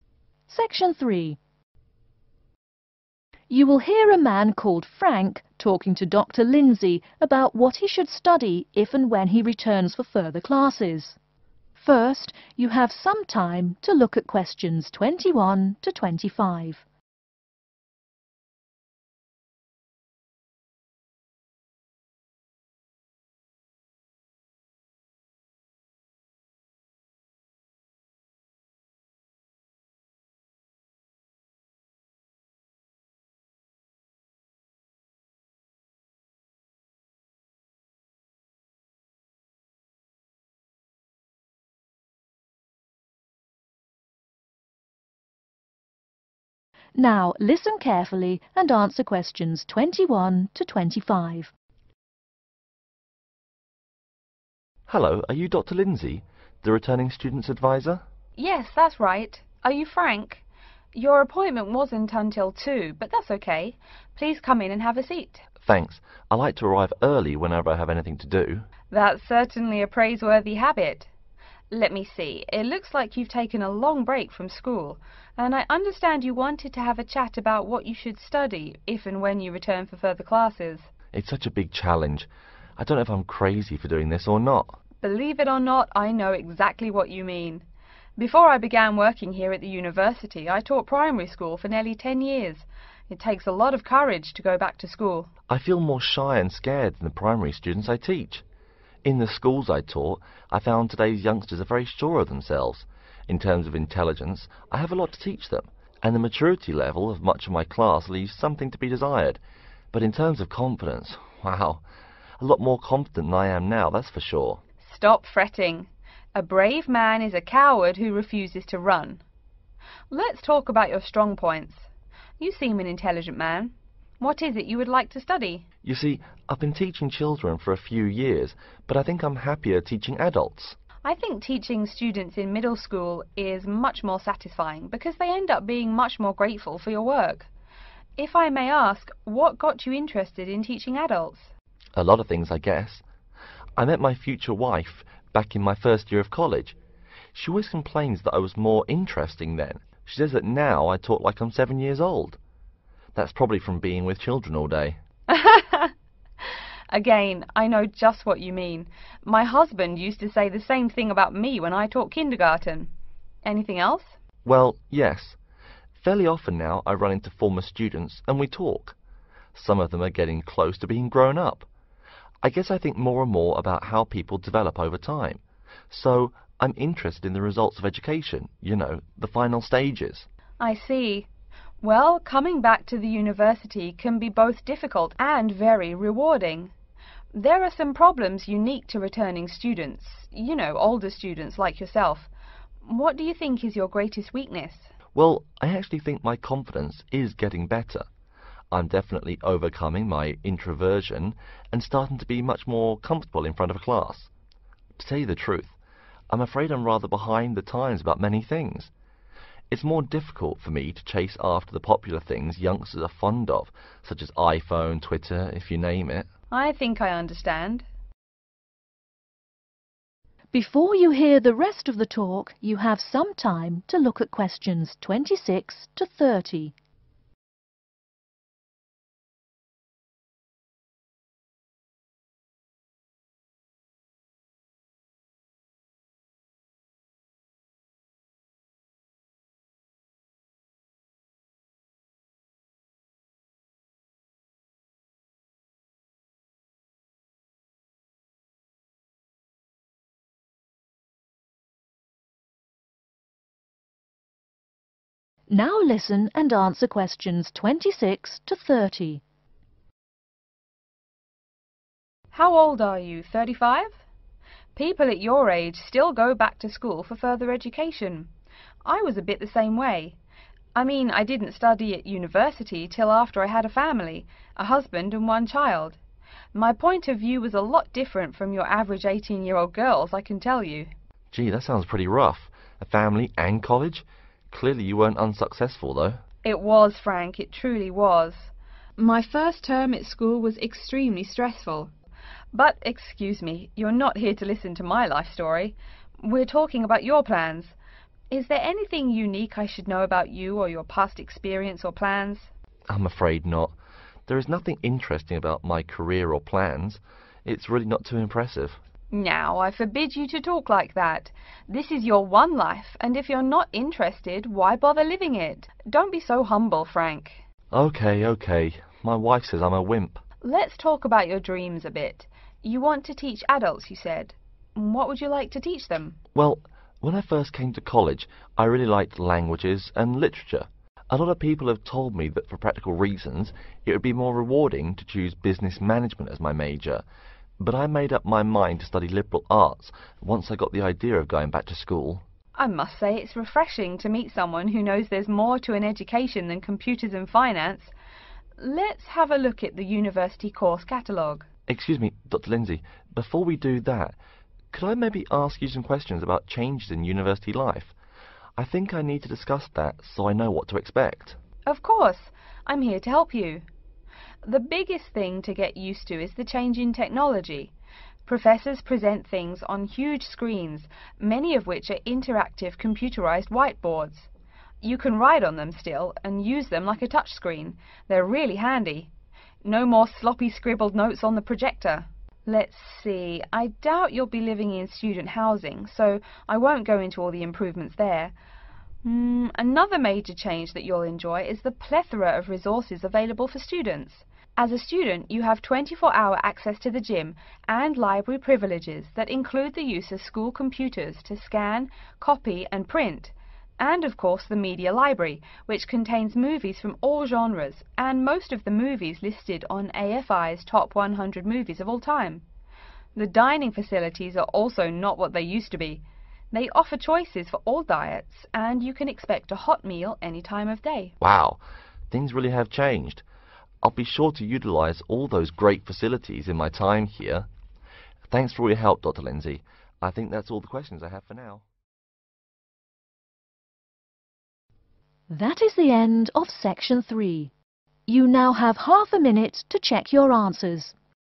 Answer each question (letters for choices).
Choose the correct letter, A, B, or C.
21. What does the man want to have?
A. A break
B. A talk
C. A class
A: B

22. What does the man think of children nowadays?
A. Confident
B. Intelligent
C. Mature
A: A

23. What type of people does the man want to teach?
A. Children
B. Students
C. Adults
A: C

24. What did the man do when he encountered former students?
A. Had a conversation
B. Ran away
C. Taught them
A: A

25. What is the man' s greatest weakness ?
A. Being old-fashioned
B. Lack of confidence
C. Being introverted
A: A

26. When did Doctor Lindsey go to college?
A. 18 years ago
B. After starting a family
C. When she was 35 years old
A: B

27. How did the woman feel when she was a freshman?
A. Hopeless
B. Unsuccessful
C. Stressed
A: C

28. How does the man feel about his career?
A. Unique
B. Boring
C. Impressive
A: B

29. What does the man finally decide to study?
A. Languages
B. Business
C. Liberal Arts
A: C

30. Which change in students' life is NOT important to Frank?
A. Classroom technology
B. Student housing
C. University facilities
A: B